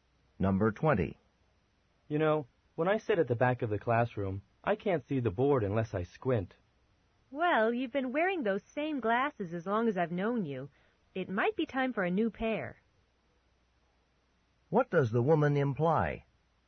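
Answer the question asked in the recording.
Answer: The man may need new glasses.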